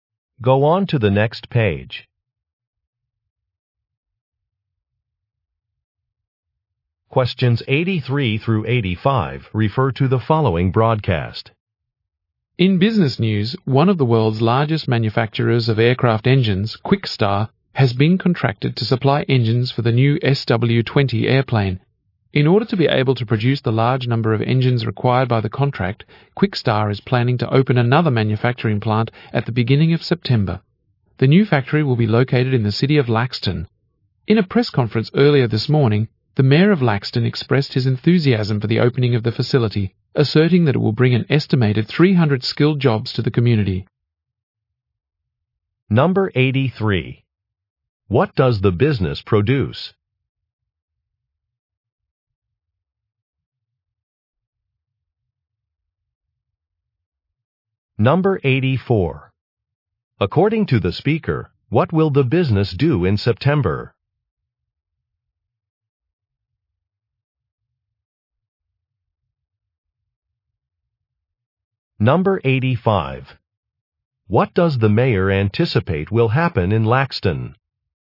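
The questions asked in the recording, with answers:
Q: What does the business produce?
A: Aircraft engines

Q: According to the speaker, what will the business do in September?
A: Open another manufacturing plant

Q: What does the mayor anticipate will happen in Laxton?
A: About 300 skilled jobs will be created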